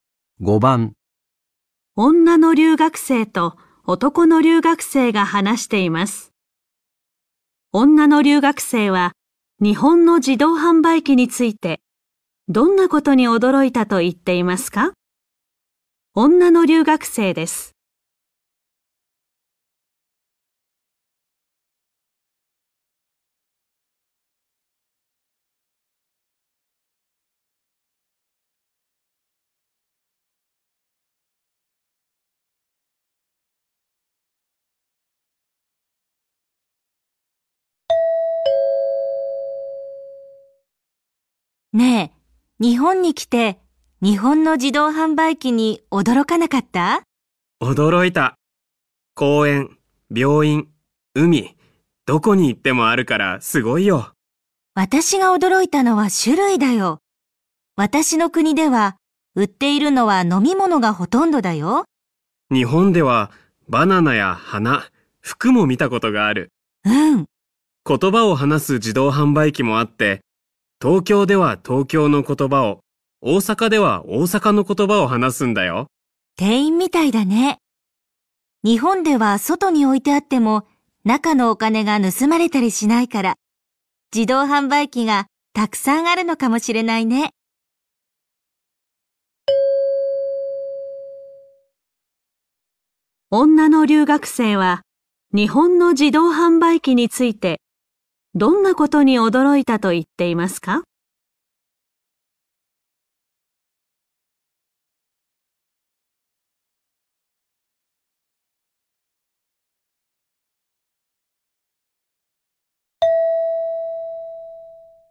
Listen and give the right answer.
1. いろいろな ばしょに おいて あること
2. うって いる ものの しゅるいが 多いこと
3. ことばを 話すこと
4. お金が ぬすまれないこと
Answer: 2. うって いる ものの しゅるいが 多いこと

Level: N4 Listening · Test 1